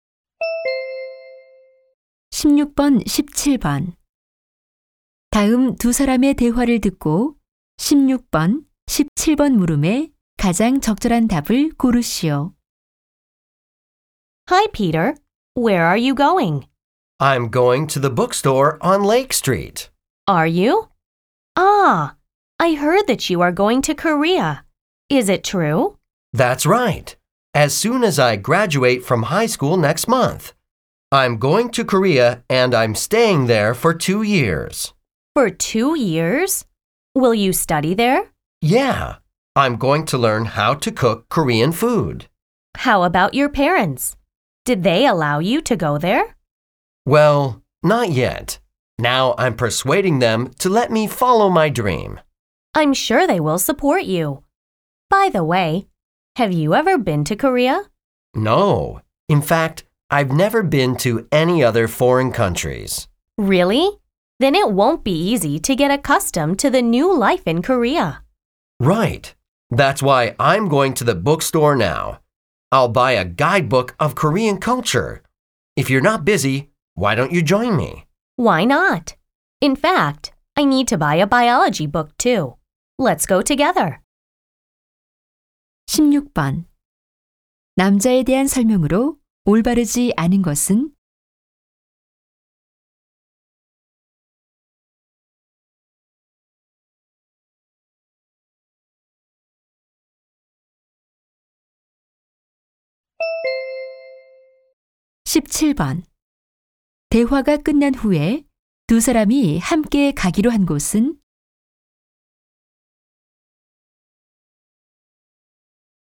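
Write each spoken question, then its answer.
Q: 대화가 끝난 후에 두 사람이 함께 가기로 한 곳은?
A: 서점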